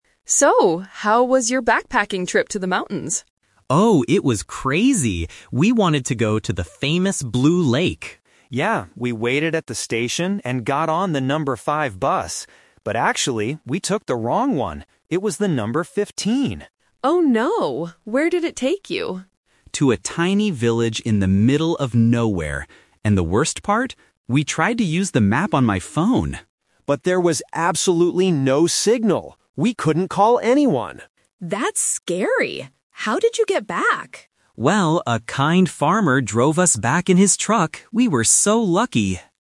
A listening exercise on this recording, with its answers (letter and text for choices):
Listen to three friends talking about a backpacking trip. Choose the correct answer (A, B, or C) for each question.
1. Where did Alex and Ben want to go at first?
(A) To a tiny village.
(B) To the Blue Lake.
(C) To a farmer's house.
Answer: (B) To the Blue Lake.

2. Why did they get lost?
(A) They couldn't find the bus station.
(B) They lost their paper map.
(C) They got on the wrong bus.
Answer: (C) They got on the wrong bus.

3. Why couldn't they use the map on Alex's phone?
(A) The phone had no battery.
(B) There was no phone signal.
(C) The phone was broken.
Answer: (B) There was no phone signal.

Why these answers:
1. Alex clearly states, "We wanted to go to the famous Blue Lake." Option A is the trap: "a tiny village" is where they actually ended up, not where they wanted to go. Option C is a trap: the farmer helped them at the end, they didn't plan to go to his house.
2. Ben explains, "we took the wrong one! It was the number 15." Option A is a trap: they "waited at the station", so finding it wasn't the problem. Option B is a trap: they tried to use a map on the phone, not a paper map.
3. Ben says, "But there was absolutely no signal!" Option A and Option C are plausible reasons for a phone not working on a trip, but they are not mentioned in the audio.

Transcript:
Chloe: So, how was your backpacking trip to the mountains?
Alex: Oh, it was crazy! We wanted to go to the famous Blue Lake.
Ben: Yeah, we waited at the station and got on the number 5 bus. But actually, we took the wrong one! It was the number 15.
Chloe: Oh no! Where did it take you?
Alex: To a tiny village in the middle of nowhere. And the worst part? We tried to use the map on my phone...
Ben: But there was absolutely no signal! We couldn't call anyone.
Chloe: That's scary! How did you get back?
Alex: Well, a kind farmer drove us back in his truck. We were so lucky!